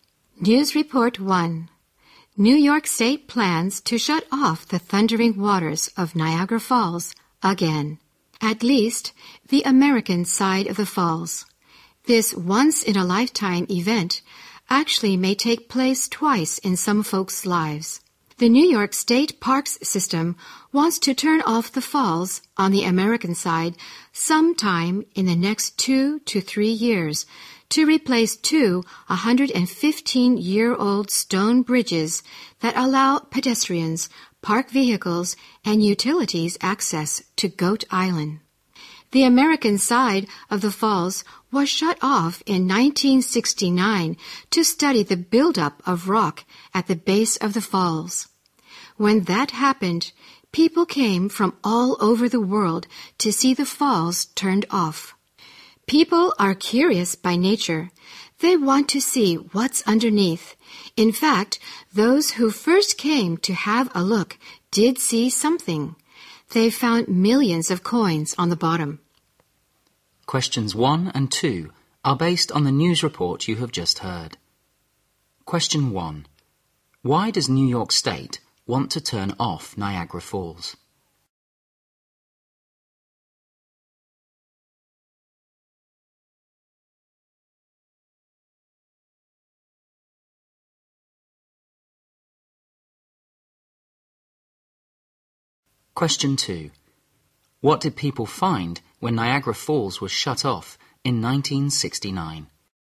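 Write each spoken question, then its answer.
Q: Why does New York State want to turn off Niagara Falls?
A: To replace two 115-year-old stone bridges to Goat Island

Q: What did people find when Niagara Falls was shut off in 1969?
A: Millions of coins on the bottom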